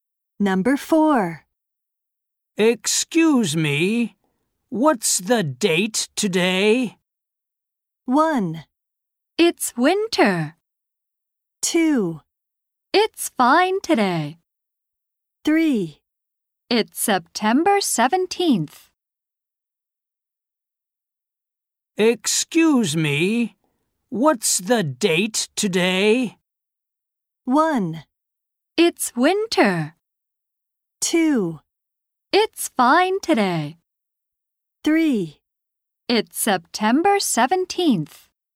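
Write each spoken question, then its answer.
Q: Excuse me, what's the date today?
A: 3: It's September 17th.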